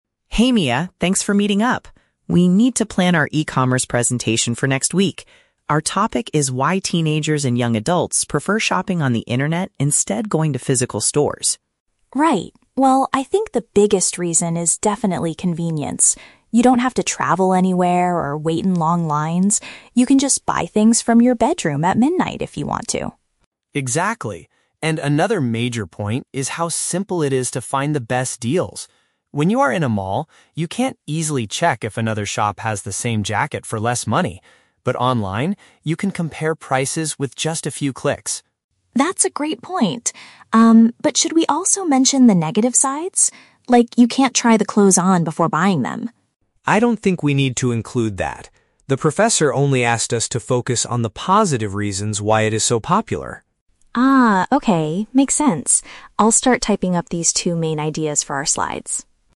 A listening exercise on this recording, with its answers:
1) What is the main subject of their upcoming presentation?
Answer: The reasons why younger generations favor buying things online.

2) According to Mia, what is the most significant advantage of online shopping?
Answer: It allows people to purchase items without leaving their homes.

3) What does Leo say about finding good deals on the internet?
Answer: It is much easier to see which website offers the lowest cost.

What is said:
Leo: Hey Mia, thanks for meeting up. We need to plan our E-commerce presentation for next week. Our topic is why teenagers and young adults prefer shopping on the internet instead of going to physical stores.
Mia: Right. Well, I think the biggest reason is definitely convenience. You don't have to travel anywhere or wait in long lines. You can just buy things from your bedroom at midnight if you want to.
Leo: Exactly. And another major point is how simple it is to find the best deals. When you are in a mall, you can't easily check if another shop has the same jacket for less money. But online, you can compare prices with just a few clicks.
Mia: That's a great point. Um, but should we also mention the negative sides? Like, you can't try the clothes on before buying them.
Leo: I don't think we need to include that. The professor only asked us to focus on the positive reasons why it is so popular.
Mia: Ah, okay. Makes sense. I'll start typing up these two main ideas for our slides.